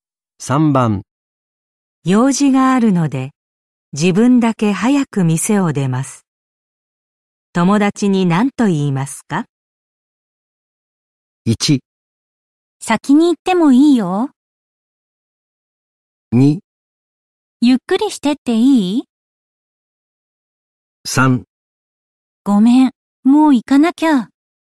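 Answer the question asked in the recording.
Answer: 3: ごめん、もう行かなきゃ。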